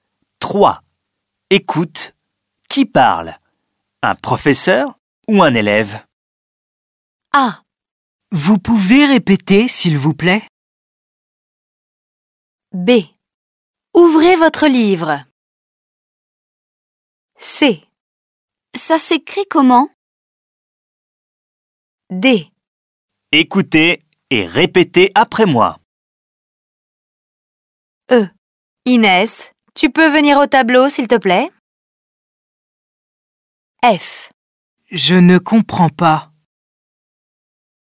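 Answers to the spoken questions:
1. un élève
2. un professeur
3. un élève
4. un professeur
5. un professeur
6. un élève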